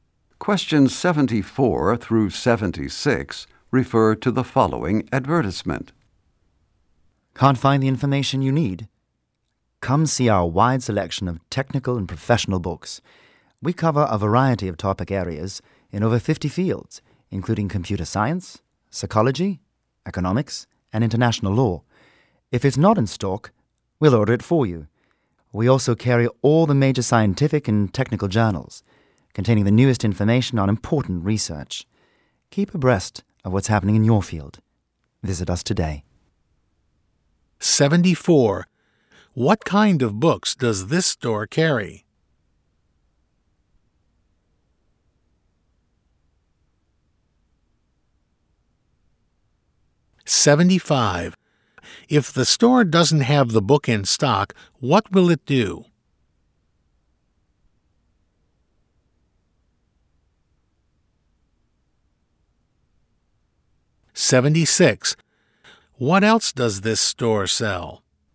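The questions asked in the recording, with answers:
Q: What kind of books does this store carry?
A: Technical and professional books

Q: If the store doesn't have the book in stock, what will it do?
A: Order it for you

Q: What else does this store sell?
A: Scientific and technical journals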